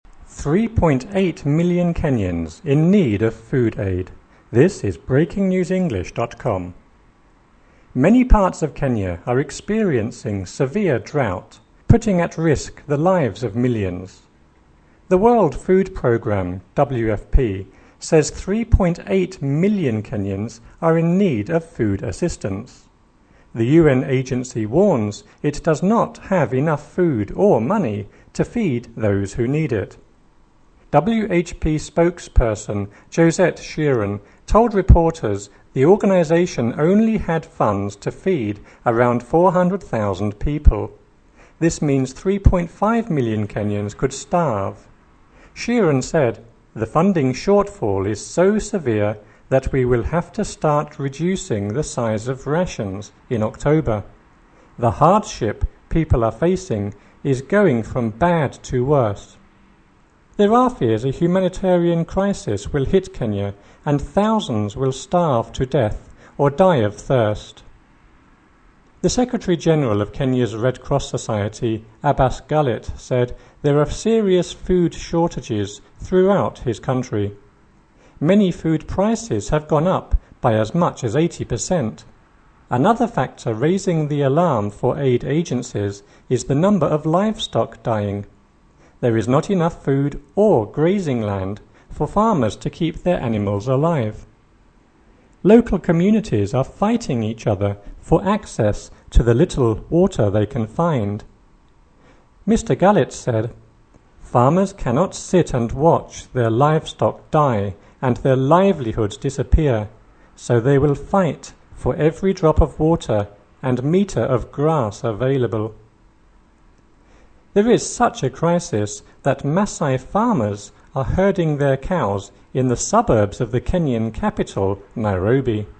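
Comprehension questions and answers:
LISTENING – Listen and fill in the gaps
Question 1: Many parts of Kenya are experiencing severe drought, _________________ lives of millions.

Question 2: The World Food Programme (WFP) says 3.8 million Kenyans ___________________ assistance.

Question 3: WFP spokesperson Josette Sheeran told reporters the organization ___________________ feed around 400,000 people.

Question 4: Sheeran said: "The funding shortfall ___________________ we will have to start reducing the size of rations [in October].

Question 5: The hardship people ___________________ from bad to worse".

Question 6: There are fears a humanitarian crisis will hit Kenya and thousands will starve to ___________________.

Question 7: The Secretary General of Kenya's Red Cross Society Abbas Gullet said there _________________ shortages throughout his country.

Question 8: Another _________________ alarm for aid agencies is the number of livestock dying.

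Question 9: There is not enough food or grazing land for farmers _________________ animals alive.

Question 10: Local communities are fighting each other for ___________________ water they can find.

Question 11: Mr. Gullet said: "Farmers cannot sit and watch their livestock die and their _________________.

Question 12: There is such a crisis that Masai farmers are herding their cows _________________ the Kenyan capital, Nairobi.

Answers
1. putting at risk the
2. are in need of food
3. only had funds to
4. is so severe that
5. are facing is going
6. death or die of thirst
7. are serious food
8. factor raising the
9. to keep their
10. access to the little
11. livelihoods disappear
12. in the suburbs of

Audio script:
3.8 million Kenyans in need of food aid
Many parts of Kenya are experiencing severe drought, putting at risk the lives of millions. The World Food Programme (WFP) says 3.8 million Kenyans are in need of food assistance. 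agency warns it does not have enough food or money to feed those who need it. WFP spokesperson Josette Sheeran told reporters the organization only had funds to feed around 400,000 people. This means 3.5 million Kenyans could starve. Sheeran said: "The funding shortfall is so severe that we will have to start reducing the size of rations [in October]. The hardship people are facing is going from bad to worse". There are fears a humanitarian crisis will hit Kenya and thousands will starve to death or die of thirst.
The Secretary General of Kenya's Red Cross Society Abbas Gullet said there are serious food shortages throughout his country. Many food prices have gone up by as much as 80 per cent. Another factor raising the alarm for aid agencies is the number of livestock dying. There is not enough food or grazing land for farmers to keep their animals alive. Local communities are fighting each other for access to the little water they can find. 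Mr. Gullet said: "Farmers cannot sit and watch their livestock die and their livelihoods disappear. So they will fight for every drop of water and metre of grass available." There is such a crisis that Masai farmers are herding their cows in the suburbs of the Kenyan capital, Nairobi.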